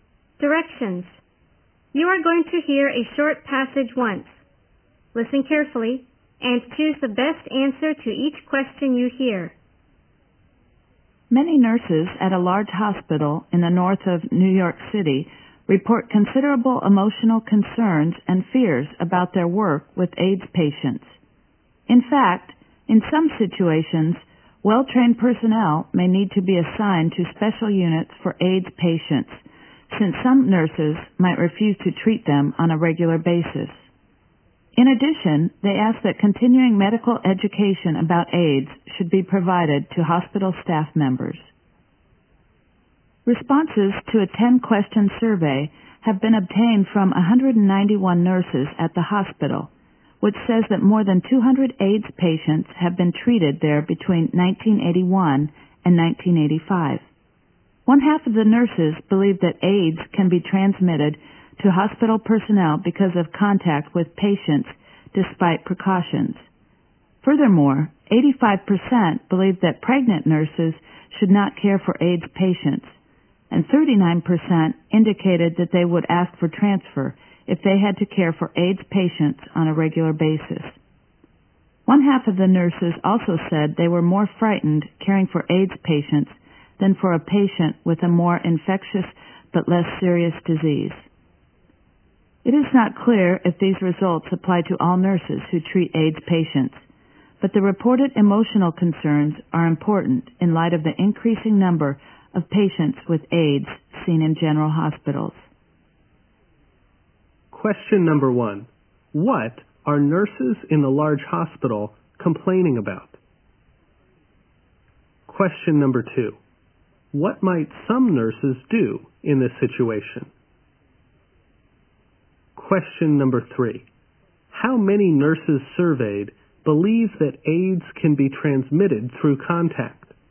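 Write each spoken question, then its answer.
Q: What are nurses in the large hospital complaining about?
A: Their emotional concerns and fears about working with AIDS patients

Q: What might some nurses do in this situation?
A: Refuse to treat AIDS patients regularly or ask for a transfer

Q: How many nurses surveyed believe that AIDS can be transmitted through contact?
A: One half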